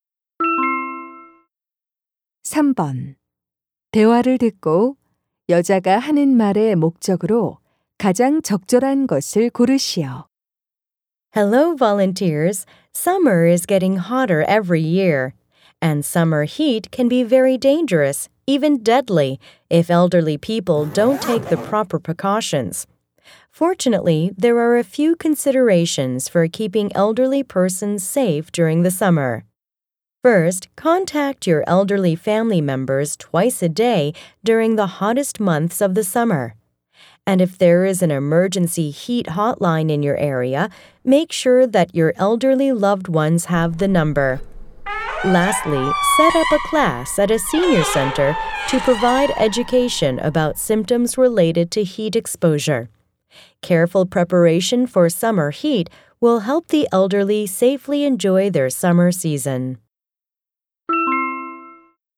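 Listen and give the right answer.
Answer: 여름철 더위로부터 노인을 안전하게 지키는 방법을 안내하려고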